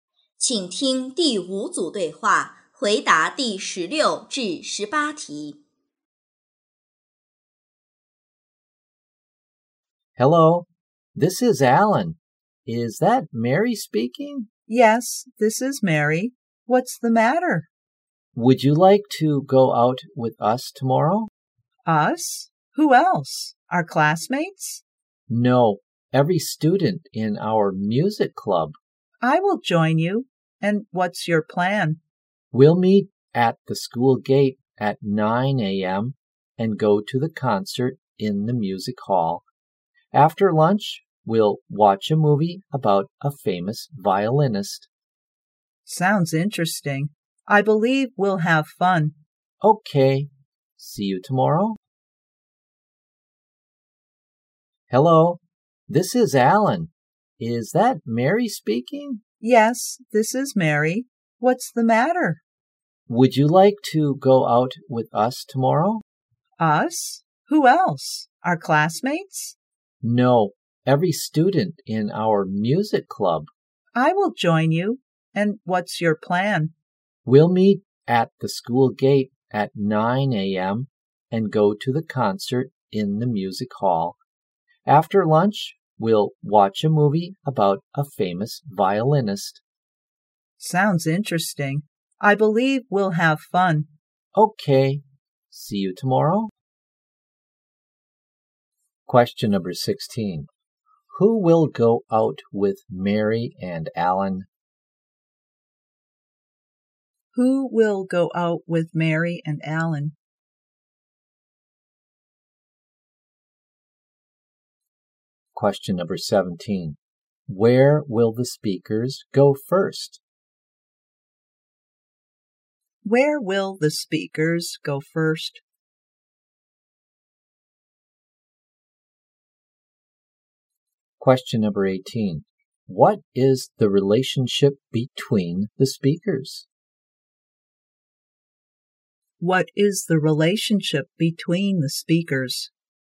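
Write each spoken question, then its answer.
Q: Who will go out with Mary and Alan?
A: Every student in their music club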